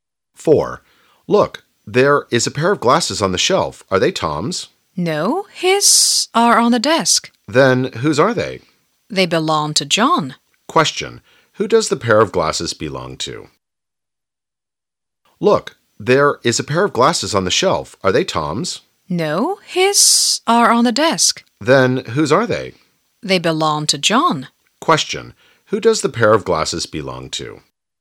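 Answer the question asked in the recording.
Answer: John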